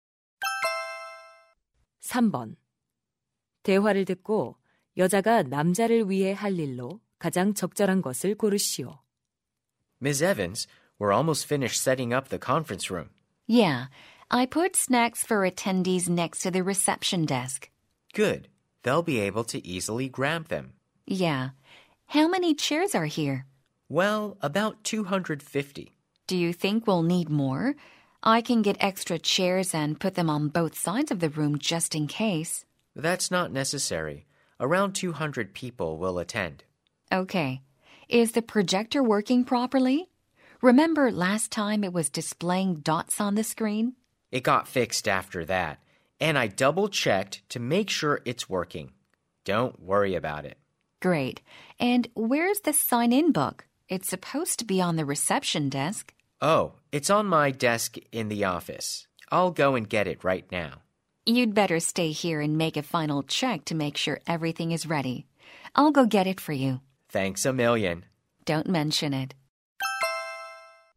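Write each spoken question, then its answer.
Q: 대화를 듣고 여자가 남자를 위해 할 일로 가장 적절한 것을 고르시오.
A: 사무실에서 방명록 가져오기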